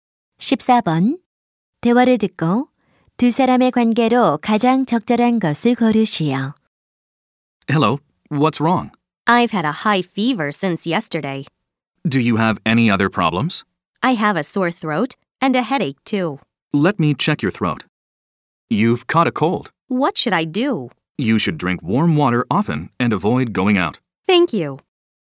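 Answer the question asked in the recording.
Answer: 의사와 환자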